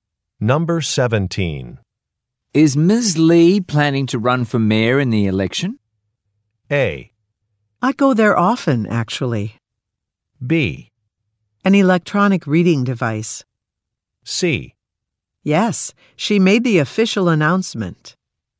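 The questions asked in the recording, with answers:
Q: Is Ms. Lee planning to run for mayor in the election?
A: C: Yes, she made the official announcement.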